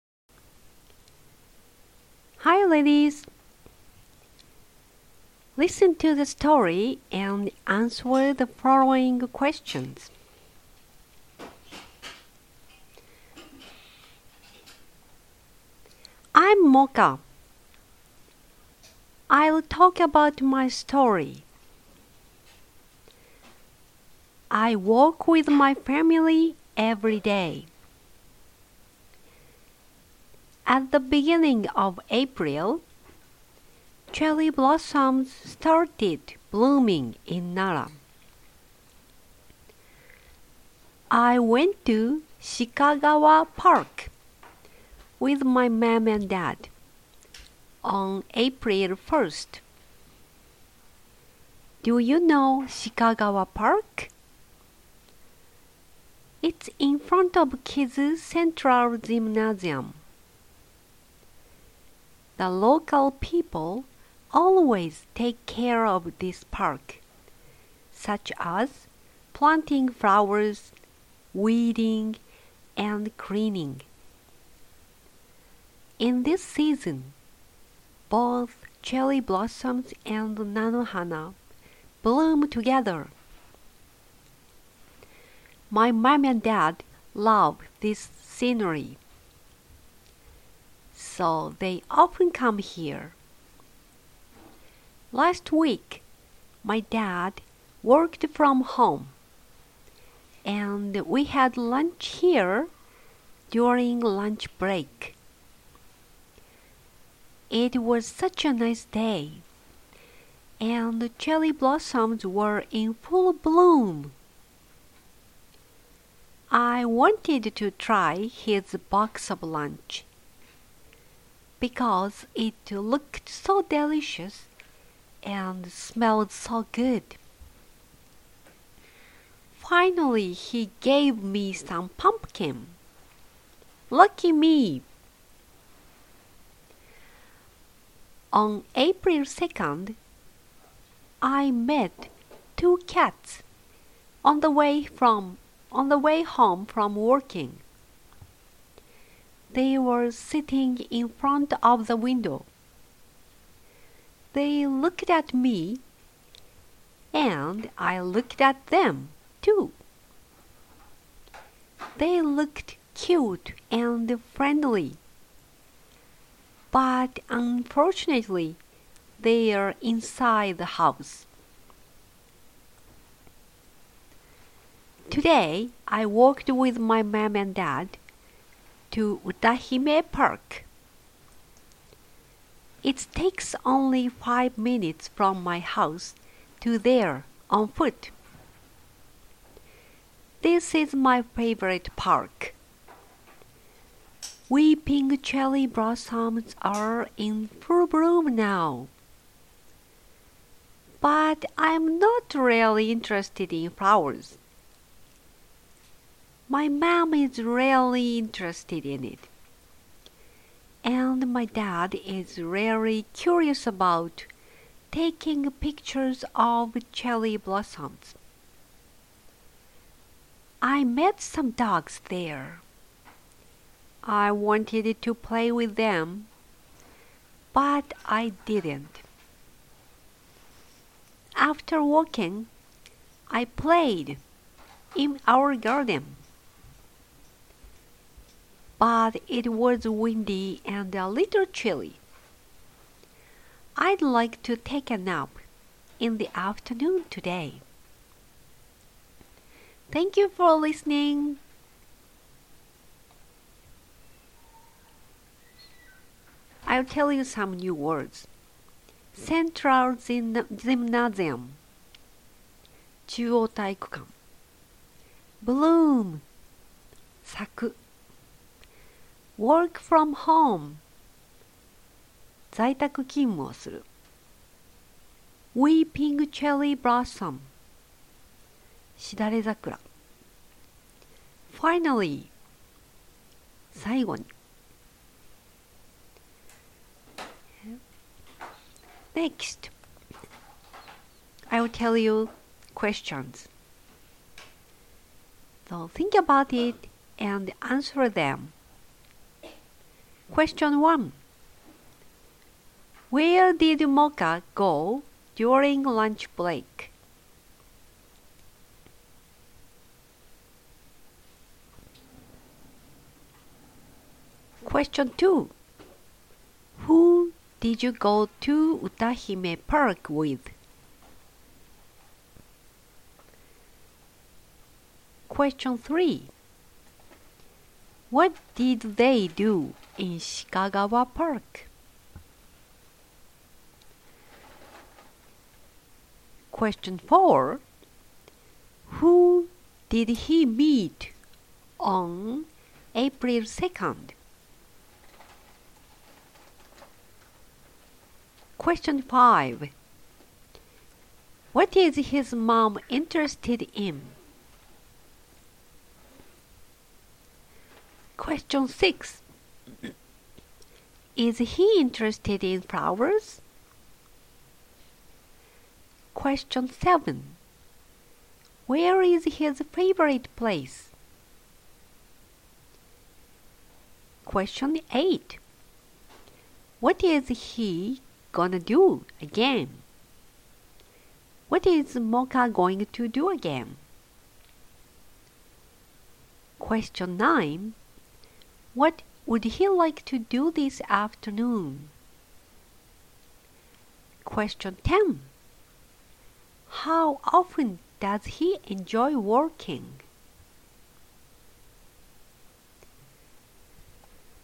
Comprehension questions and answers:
Listen to the story and answer the following questions.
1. Where did Mocha go during lunch break?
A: He went to 鹿川 park during the lunch break.

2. Who did he go to 歌姫 park with?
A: He went there with his mom and dad.

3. Who did he meet on 4/2?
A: He met two cats.

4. What is his mom interested in?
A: She is interested in cherry blossoms.

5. Is he interested in flowers?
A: He is not interested in them.

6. Where is his favorite place?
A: He loves 歌姫 park.

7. What would he like to do this afternoon?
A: He'd like to take a nap.

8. How often does he enjoy walking?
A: He enjoys walking every day.

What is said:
I'm Mocha.
I'll talk about my story.
I walk with my family every day.
At the beginning of April cherry blossoms started blooming in Nara.
I went to 鹿川 park with my mom and dad on 4/1.
Do you know 鹿川 park?
It's in front of 木津 central gymnasium.
The local people always take care of this park such as planting flowers, weeding, and cleaning.
In this season, both cherry blossoms and 菜の花 bloom together.
My mom and dad love this scenery. So they often come here.
Last week my dad worked from home and we had lunch here during lunch break.
It was such a nice day and cherry blossoms were in full bloom.
I wanted to try his lunch. Because it looked so delicious and smelled so good.
Finally, he gave me some pumpkin. Lucky me.
On 4/2, I met 2 cats on the way home from walking.
They were sitting in front of the window. They looked at me and I looked at them, too.
They looked cute and friendly but unfortunately, they were inside the house.
Today, I walked with my mom and dad to 歌姫 park.
It takes only 5 minutes from my house to there on foot.
This is my favorite park,
Weeping cherry blossoms are in full bloom now.
But I'm not really interested in flowers.
My mom is really interested in it.
And my dad is really curious about taking pictures of cherry blossoms.
I met some dogs there. I wanted to play with them. But I didn't.
After walking, I played in our garden.
But it was windy and a little chilly.
I'd like to take a nap in the afternoon today.
central gymnasium 中央体育館
bloom 咲く
work from home 在宅勤務する
Weeping cherry blossom しだれ桜
finally 最後に